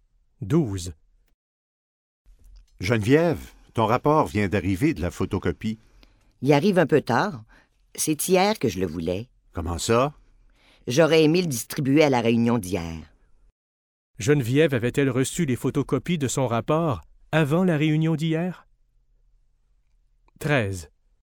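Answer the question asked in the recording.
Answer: Non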